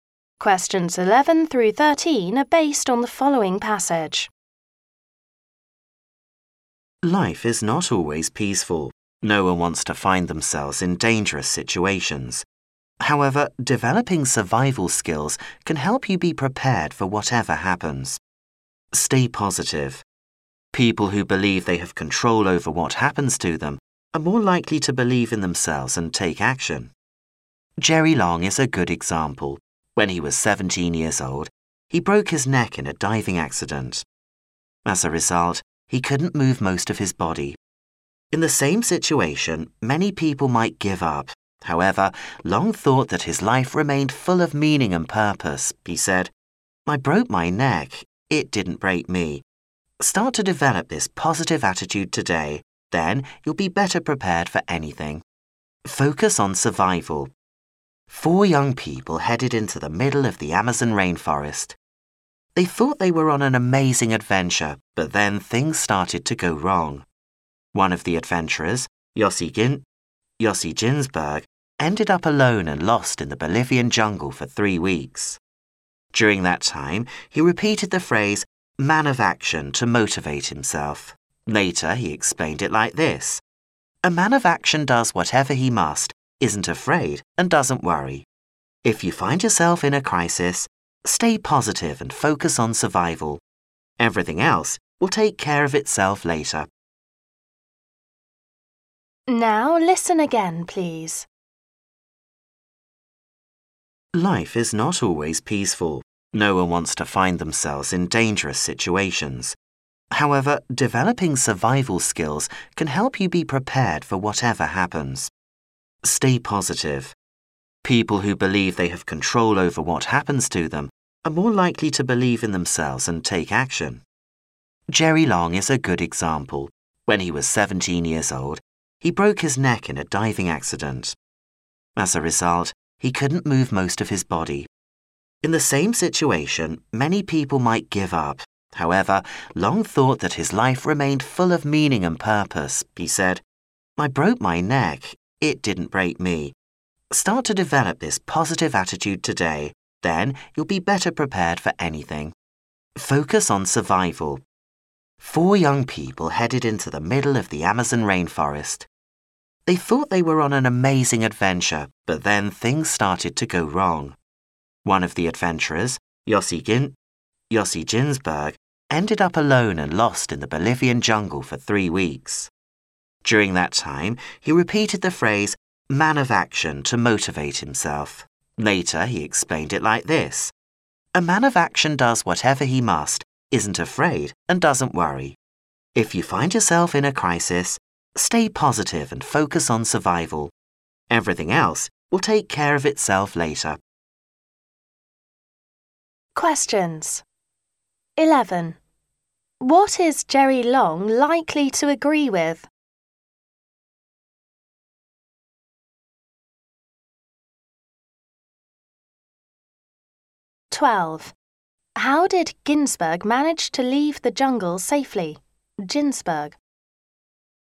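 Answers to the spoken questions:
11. Keep a positive attitude; an accident can't break you.
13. In a crisis, stay positive and focus on survival.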